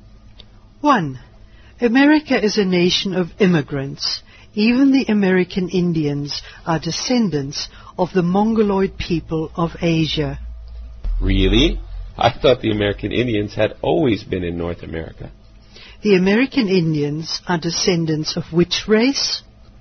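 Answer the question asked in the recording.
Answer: The Mongoloid people of Asia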